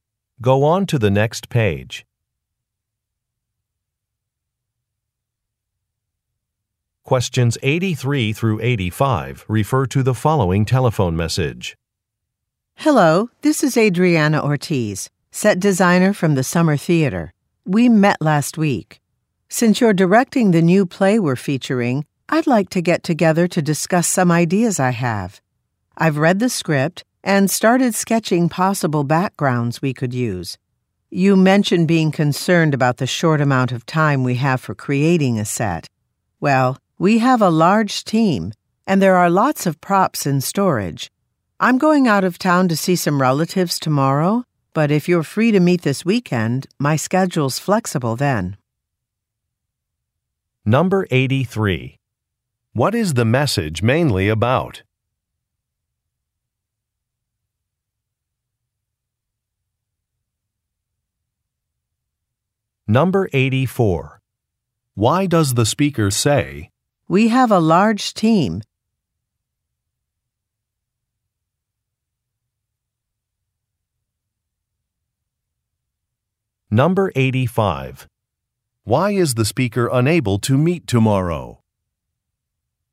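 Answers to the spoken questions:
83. Setting up a meeting to discuss ideas for the play's set design
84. To reassure the listener that the set can be built in the short time available
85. She is going out of town to visit relatives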